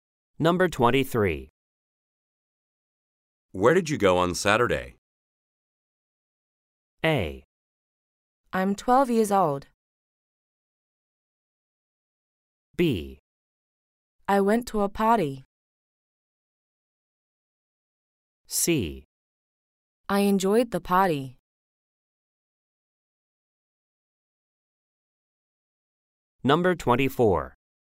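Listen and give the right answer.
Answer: B: I went to a party.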